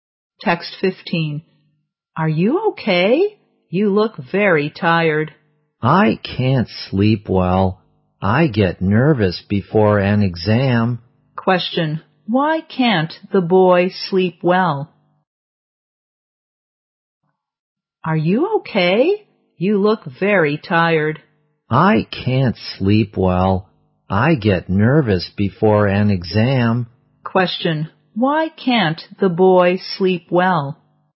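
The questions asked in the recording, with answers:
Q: Why can't the boy sleep well?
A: He gets nervous before an exam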